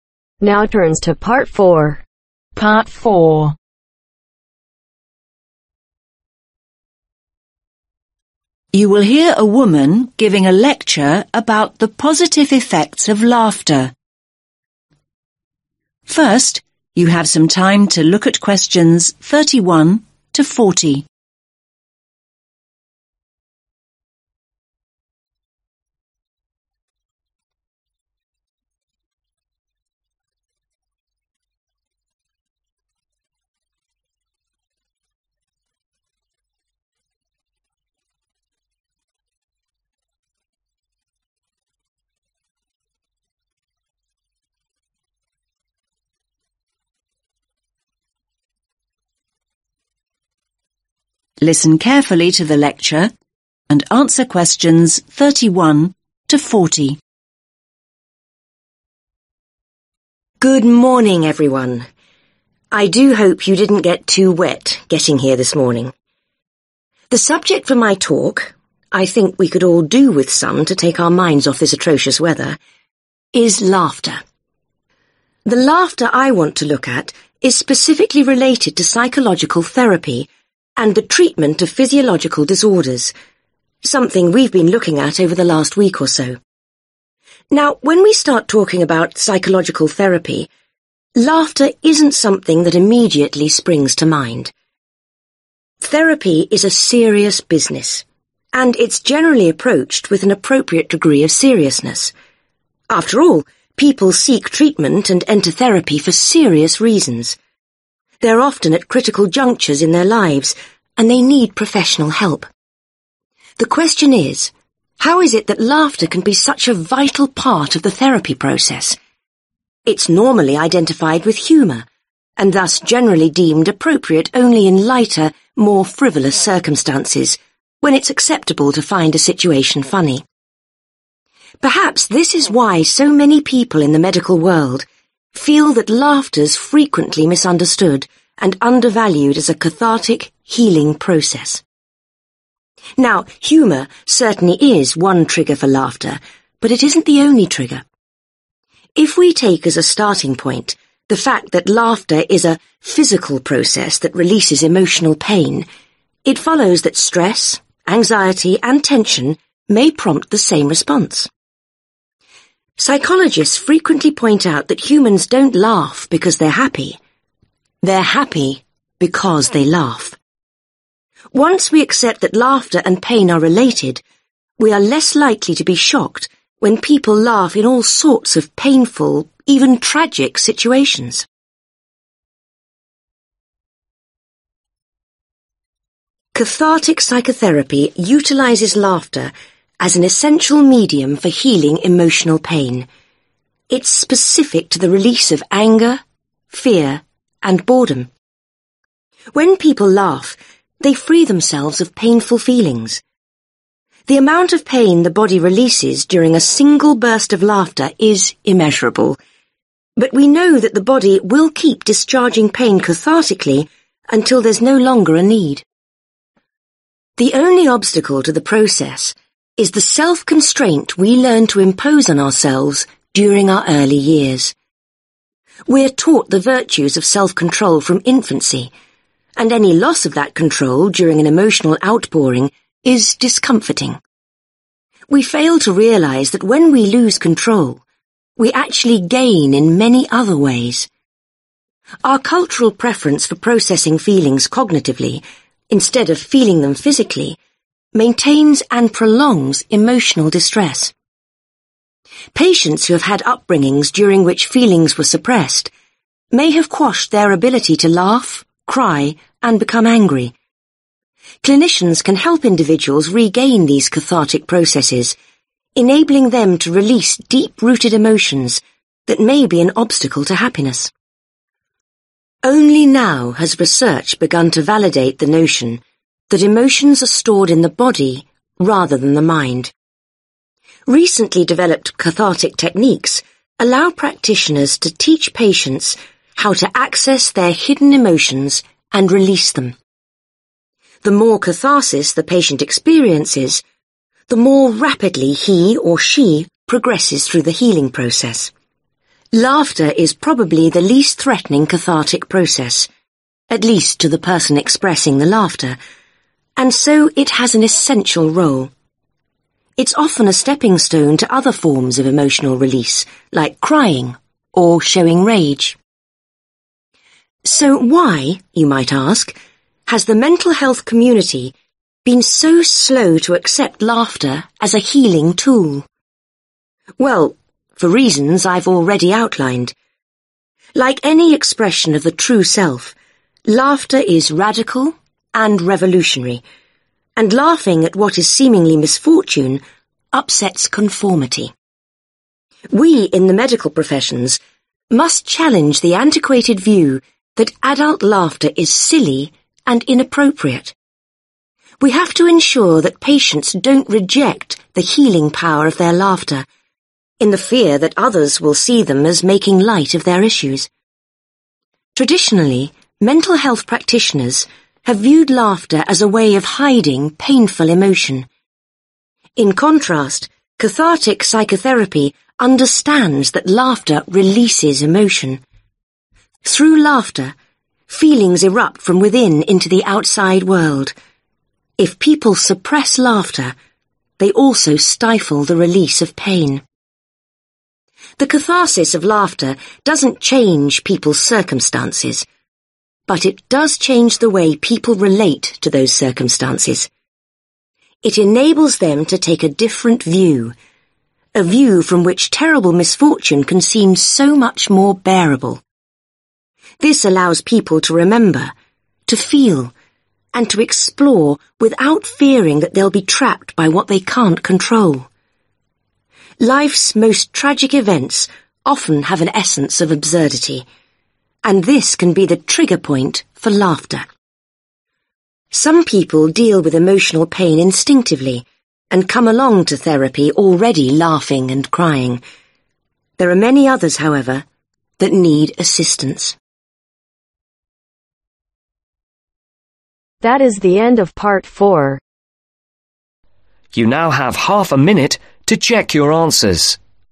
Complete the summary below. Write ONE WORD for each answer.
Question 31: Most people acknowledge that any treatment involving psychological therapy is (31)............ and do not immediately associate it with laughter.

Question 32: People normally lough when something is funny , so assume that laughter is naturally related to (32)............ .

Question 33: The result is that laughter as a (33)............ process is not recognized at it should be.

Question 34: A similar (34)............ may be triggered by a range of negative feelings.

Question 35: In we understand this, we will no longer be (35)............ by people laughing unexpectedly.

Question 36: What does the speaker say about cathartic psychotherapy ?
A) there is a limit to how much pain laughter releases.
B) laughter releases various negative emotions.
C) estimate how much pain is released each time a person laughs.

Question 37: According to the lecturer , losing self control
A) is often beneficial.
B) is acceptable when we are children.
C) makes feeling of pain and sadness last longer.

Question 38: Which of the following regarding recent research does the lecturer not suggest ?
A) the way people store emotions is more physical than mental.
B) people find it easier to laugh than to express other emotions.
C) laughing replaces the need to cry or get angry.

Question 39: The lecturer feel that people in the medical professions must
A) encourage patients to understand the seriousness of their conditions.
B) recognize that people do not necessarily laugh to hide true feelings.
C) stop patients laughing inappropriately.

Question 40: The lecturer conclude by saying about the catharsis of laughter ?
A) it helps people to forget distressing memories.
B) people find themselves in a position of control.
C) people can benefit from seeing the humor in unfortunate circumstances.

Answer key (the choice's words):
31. Serious
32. Humor
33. Healing
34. Response
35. Shocked
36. laughter releases various negative emotions.
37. is often beneficial.
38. laughing replaces the need to cry or get angry.
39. recognize that people do not necessarily laugh to hide true feelings.
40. people can benefit from seeing the humor in unfortunate circumstances.